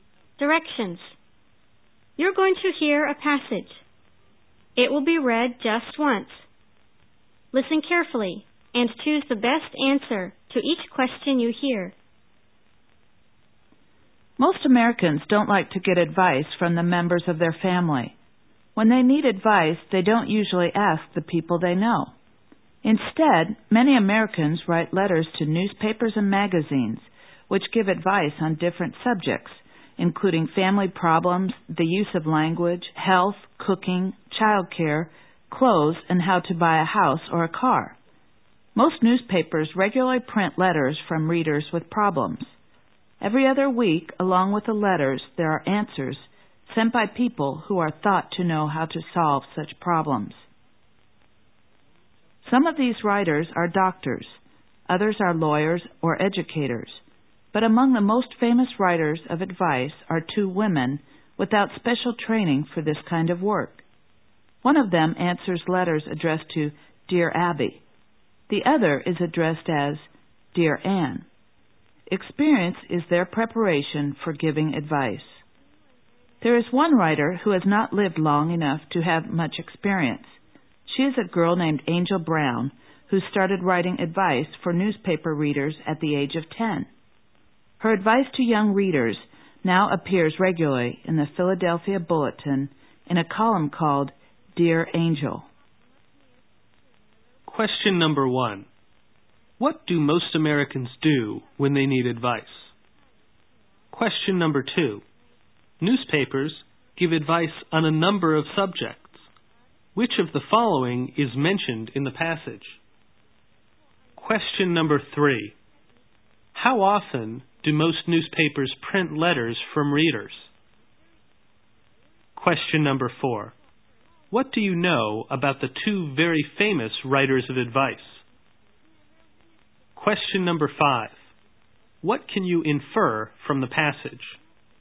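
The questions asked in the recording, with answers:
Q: What do most Americans do when they need advice?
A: They write letters to newspapers and magazines

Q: What do you know about the two very famous writers of advice?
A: They are women with no special training; their preparation is experience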